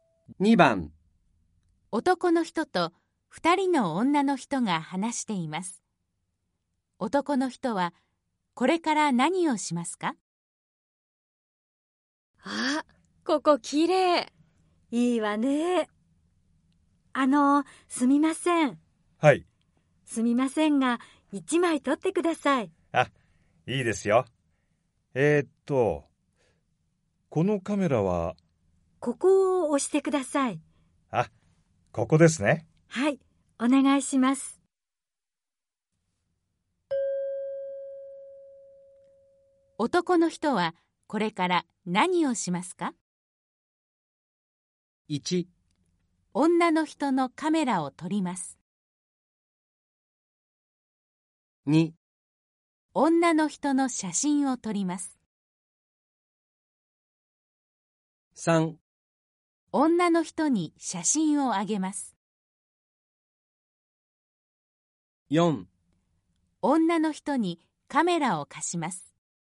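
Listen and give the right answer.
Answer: 2: 女の人の写真を撮ります。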